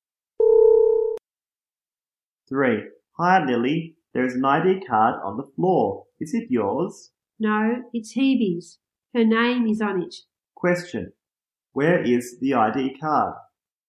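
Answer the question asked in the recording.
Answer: On the floor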